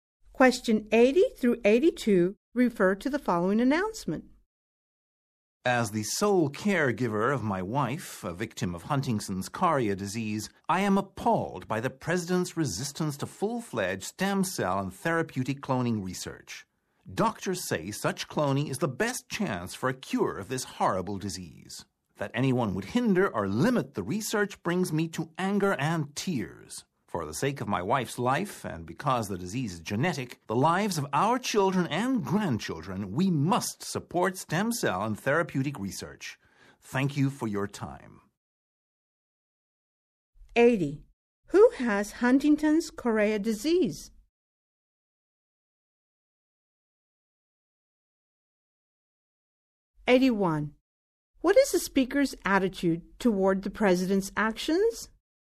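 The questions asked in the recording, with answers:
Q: Who has Huntington's chorea disease?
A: The speaker's wife

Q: What is the speaker's attitude toward the president's actions?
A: Angry and appalled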